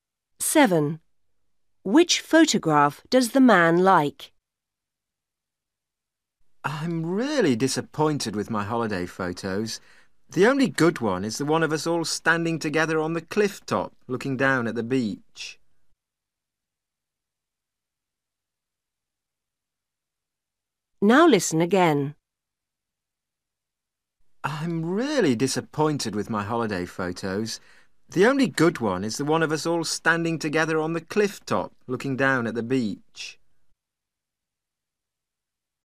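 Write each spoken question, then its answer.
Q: Which photograph does the man like?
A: The one of them all standing together on the cliff top, looking down at the beach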